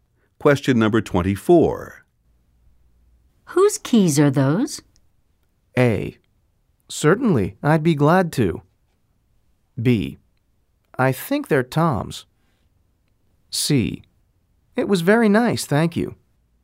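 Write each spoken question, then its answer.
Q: Whose keys are those?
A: B: I think they're Tom's.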